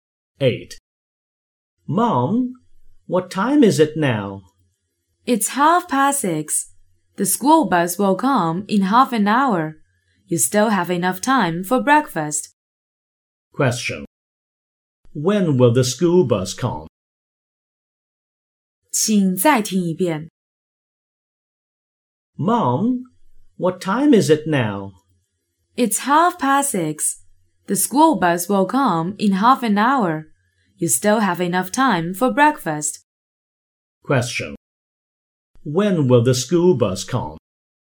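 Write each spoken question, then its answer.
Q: When will the school bus come?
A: At 7:00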